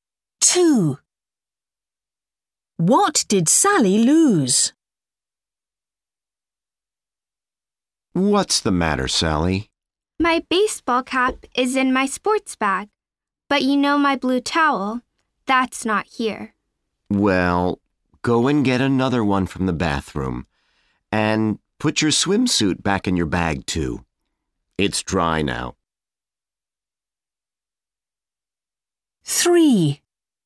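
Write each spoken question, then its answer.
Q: What did Sally lose?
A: Her blue towel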